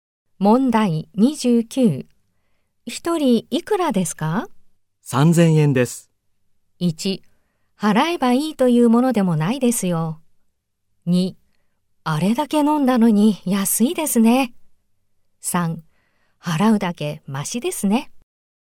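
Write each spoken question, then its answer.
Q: 一人いくらですか?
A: 2: あれだけ飲んだのに安いですね。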